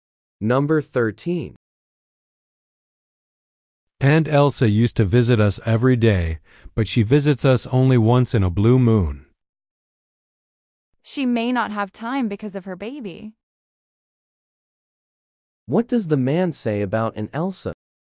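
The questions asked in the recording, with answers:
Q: What does the man say about Aunt Elsa?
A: She rarely visits now.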